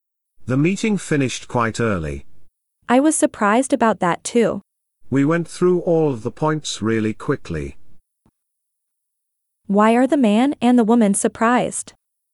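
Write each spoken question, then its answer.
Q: Why are the man and the woman surprised?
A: The meeting finished early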